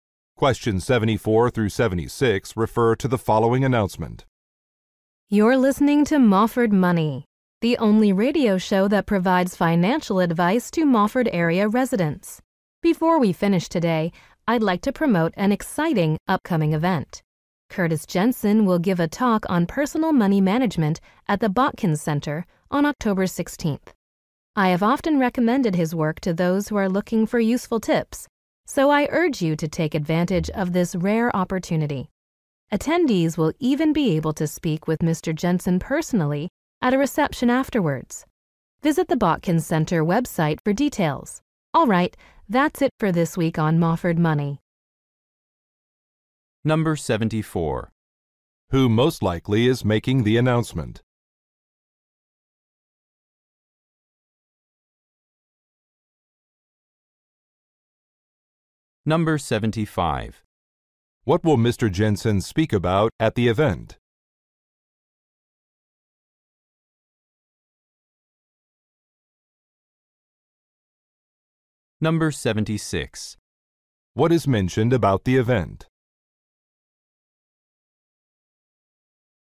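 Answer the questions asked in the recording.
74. A radio show host
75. Personal money management
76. Attendees can speak with Mr. Jensen at a reception afterwards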